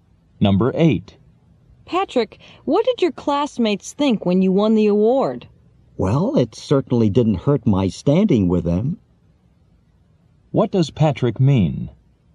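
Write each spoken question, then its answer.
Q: What does Patrick mean?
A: Winning improved his standing with classmates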